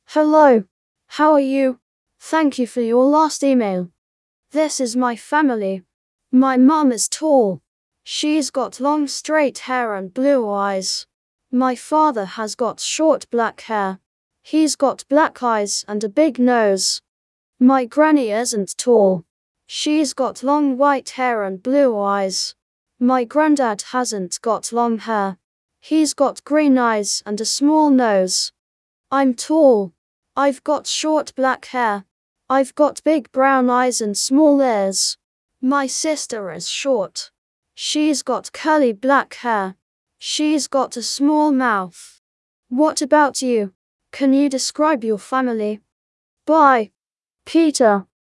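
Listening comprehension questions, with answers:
In pairs, answer the following questions selecting TRUE / FALSE.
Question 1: Peter's mum has got short hair.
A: FALSE

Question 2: Peter ́s dad has got black hair and black eyes.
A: TRUE

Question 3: Peter's granny is tall.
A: FALSE

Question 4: Peter's grandfather has got green eyes.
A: TRUE

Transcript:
Hello!
How are you? Thank you for your last email!
This is my family. My mum is tall. She's got long straight hair and blue eyes. My father has got short black hair.
She's got long white hair and blue eyes. My grandad hasn't got long hair. He's got green eyes and a small nose.
I'm tall. I've got big brown eyes and small ears. My sister is short. She's got curly black hair. She's got a small mouth.
What about you? Can you describe your family?
Bye!
Peter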